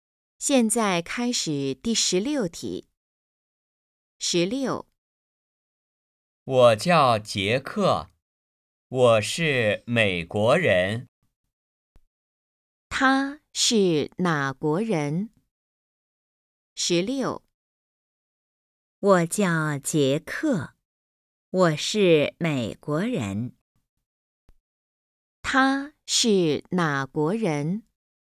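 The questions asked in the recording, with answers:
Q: 他是哪国人?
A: 美国人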